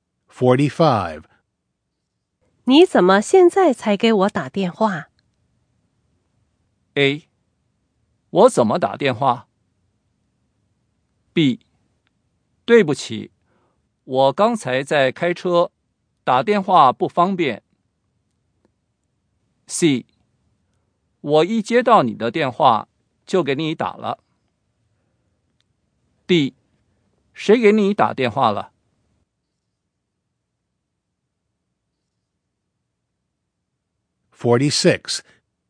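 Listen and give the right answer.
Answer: B: 对不起,我刚才在开车,打电话不方便。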